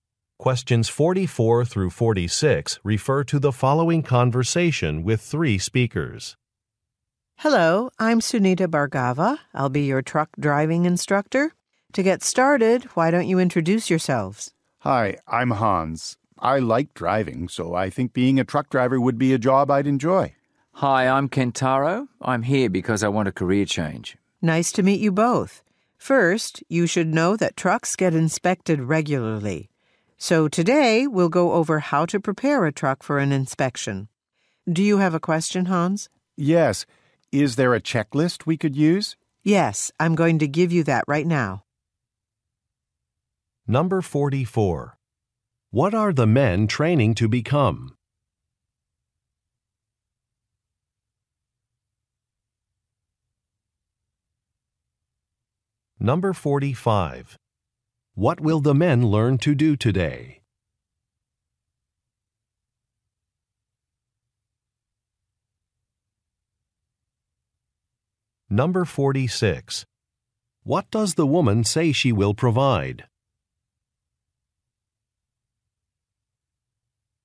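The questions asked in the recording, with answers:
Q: What are the men training to become?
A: Truck drivers

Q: What will the men learn to do today?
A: Prepare a truck for an inspection

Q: What does the woman say she will provide?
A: A checklist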